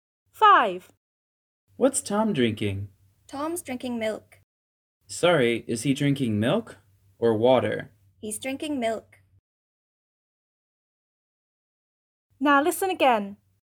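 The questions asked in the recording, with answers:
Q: What's Tom drinking?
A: milk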